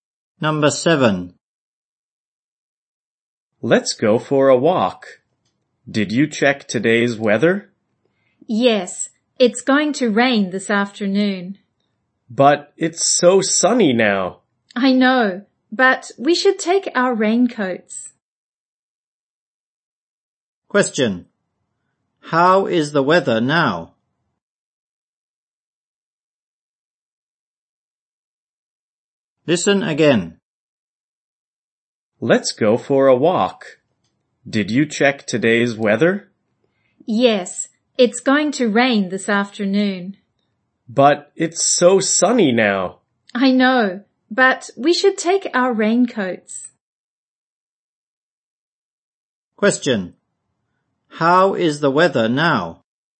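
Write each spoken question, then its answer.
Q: How is the weather now?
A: It's sunny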